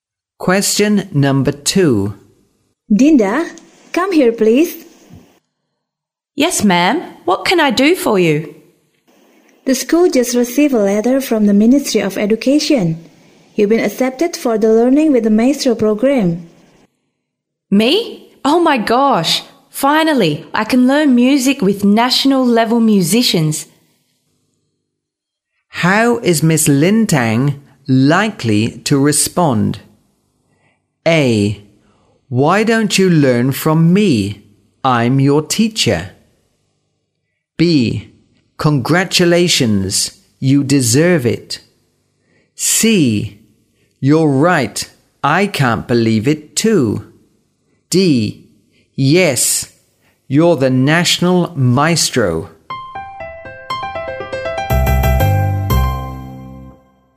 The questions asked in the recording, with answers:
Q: How is Miss Lin Tang likely to respond?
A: B. Congratulations, you deserve it.